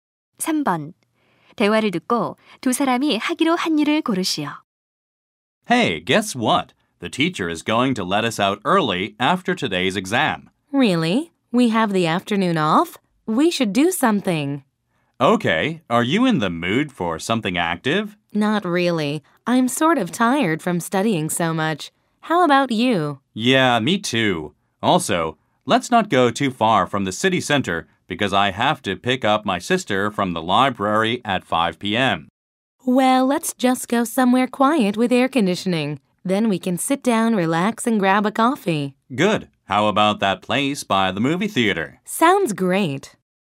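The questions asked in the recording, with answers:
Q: 대화를 듣고 두 사람이 하기로 한 일을 고르시오.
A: 극장 옆 카페에서 커피 마시며 쉬기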